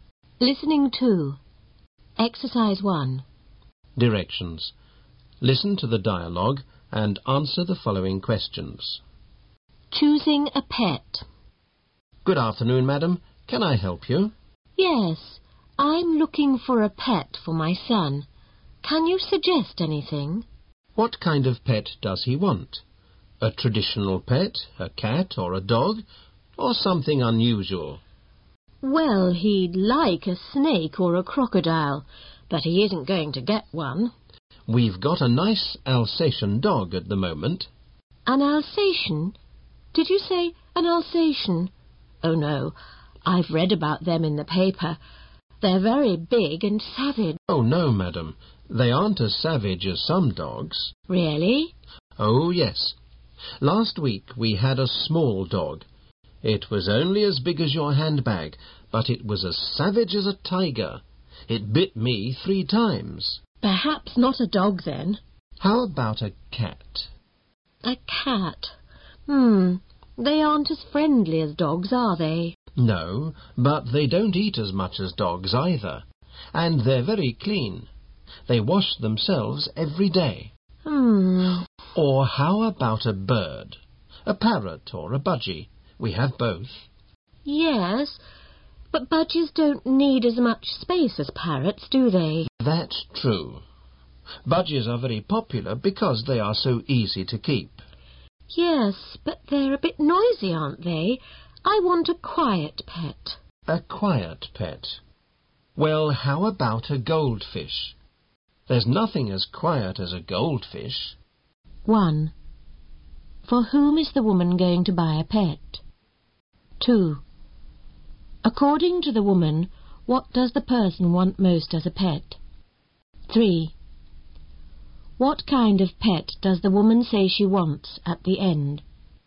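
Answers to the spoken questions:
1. For her son
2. A snake or a crocodile
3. A quiet pet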